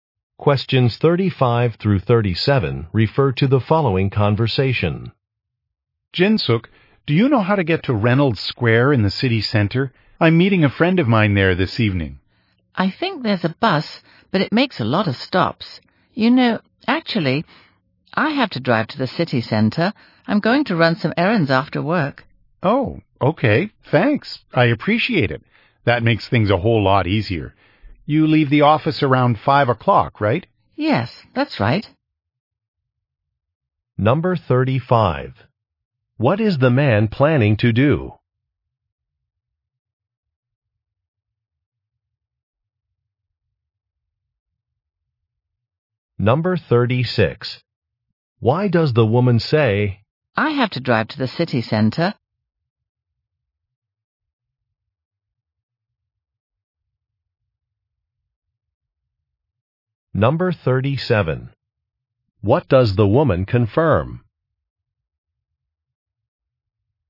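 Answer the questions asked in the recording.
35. Meet a friend at Reynolds Square in the city center
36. To offer the man a ride
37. That she leaves the office around 5 o'clock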